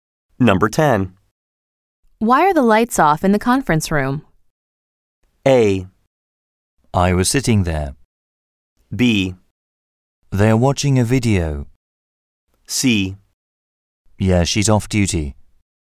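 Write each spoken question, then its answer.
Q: Why are the lights off in the conference room?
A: B: They are watching a video.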